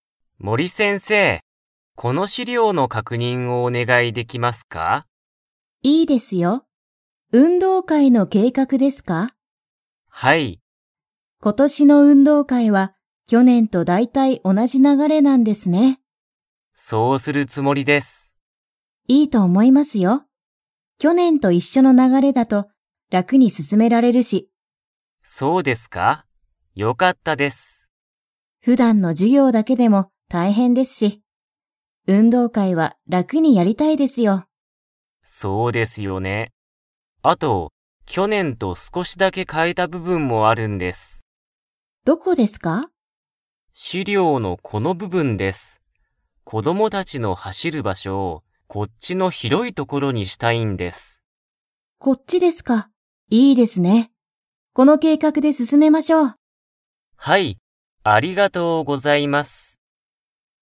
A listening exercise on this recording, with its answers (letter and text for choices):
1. 今年ことしの運動会うんどうかいは、去年きょねんと 流ながれだ。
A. 全まったく違ちがう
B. だいたい同おなじ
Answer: B. だいたい同おなじ

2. 小林こばやしさんは、こどもたちの走はしる場所ばしょを、どこにしたいですか?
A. 去年きょねんと同おなじ所ところ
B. きれいな所ところ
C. 遠とおい所ところ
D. 広ひろい所ところ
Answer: D. 広ひろい所ところ

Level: Level 4